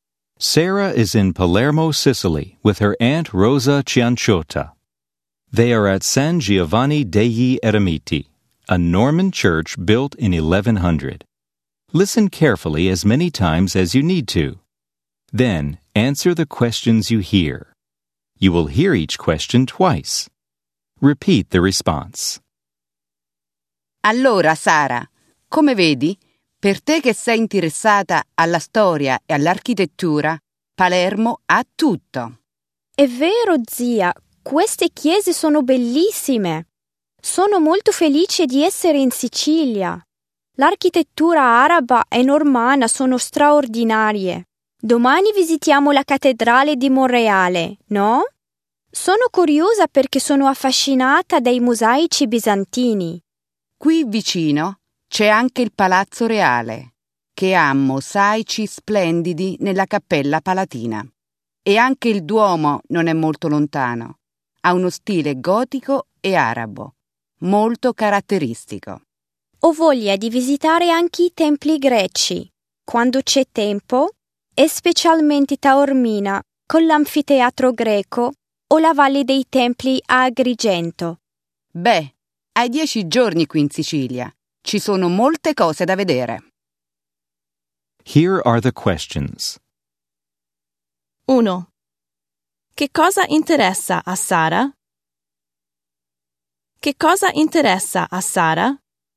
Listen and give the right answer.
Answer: A Sara interessa la storia e l'architettura.